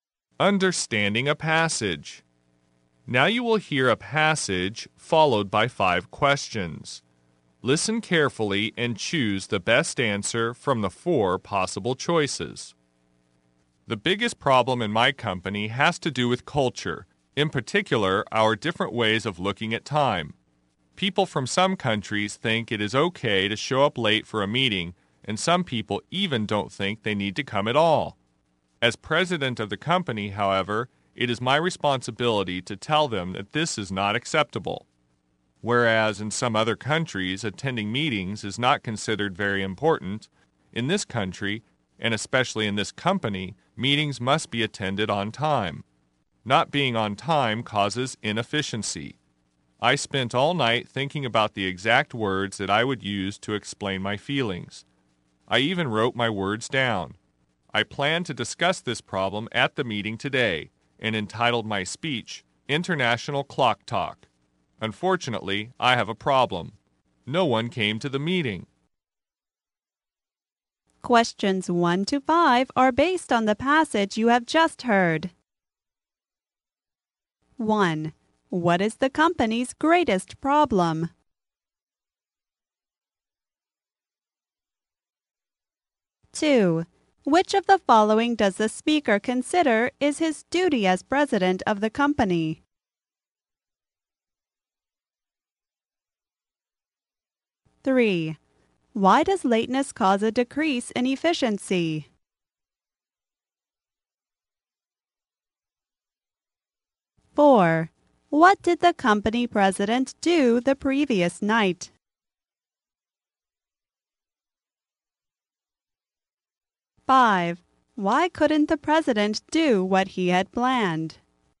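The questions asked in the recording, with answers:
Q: What is the company's greatest problem?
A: Different ways of looking at time

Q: Which of the following does the speaker consider is his duty as president of the company?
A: Telling people lateness is not acceptable

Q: What did the company president do the previous night?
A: He thought about the exact words to use and wrote them down

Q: Why couldn't the president do what he had planned?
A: No one came to the meeting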